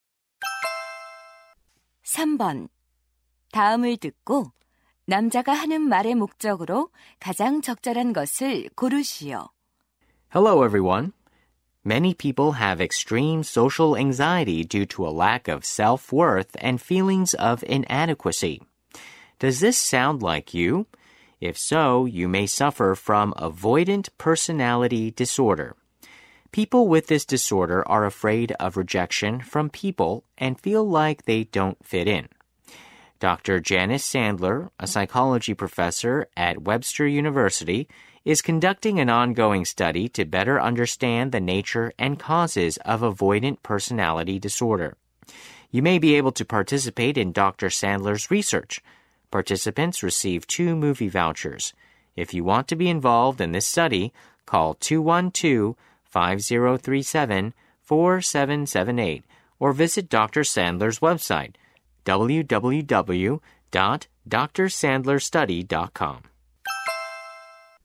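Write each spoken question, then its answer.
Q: 다음을 듣고 남자가 하는 말의 목적으로 가장 적절한 것을 고르시오.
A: 회피성 인격장애 연구 참가자를 모집하려고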